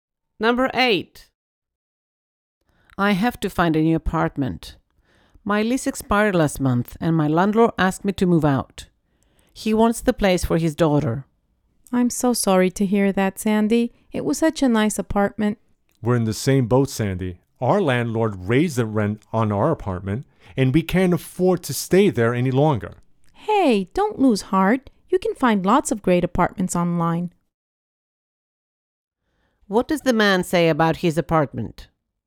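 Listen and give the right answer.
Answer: He also has to move because the rent was raised and they can't afford it.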